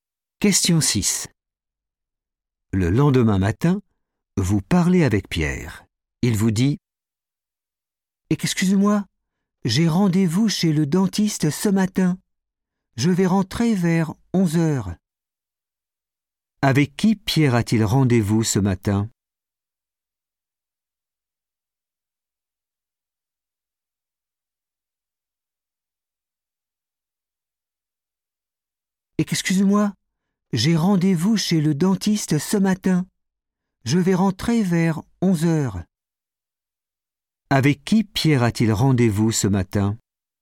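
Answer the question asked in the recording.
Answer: le dentiste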